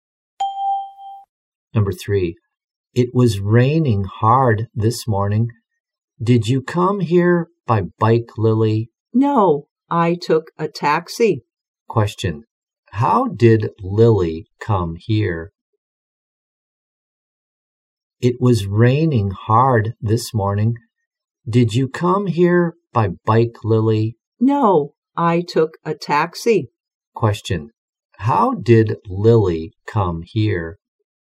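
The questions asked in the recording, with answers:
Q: How did Lily come here?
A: By taxi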